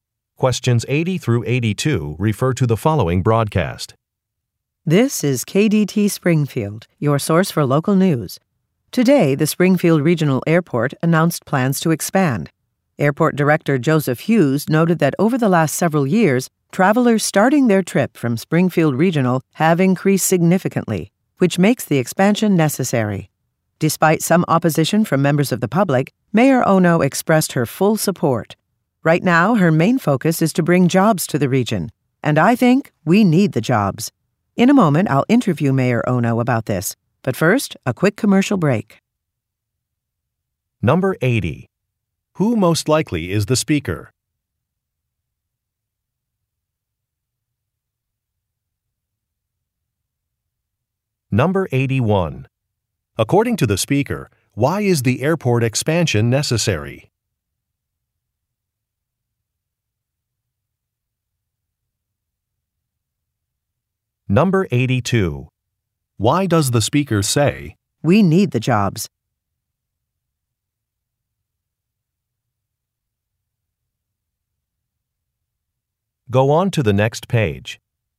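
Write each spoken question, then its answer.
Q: Who most likely is the speaker?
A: A news reporter

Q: Why is the airport expansion necessary?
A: The number of travelers has increased significantly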